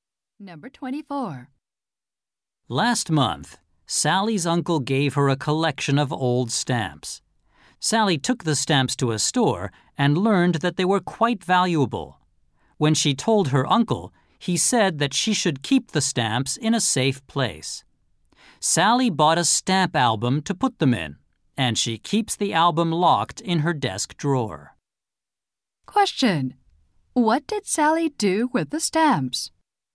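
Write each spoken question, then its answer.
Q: Question: What did Sally do with the stamps?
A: She put them in an album locked in her desk drawer.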